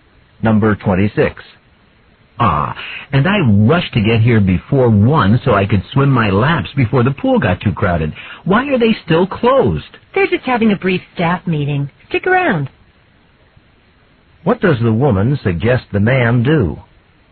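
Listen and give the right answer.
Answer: Wait; the pool will open soon.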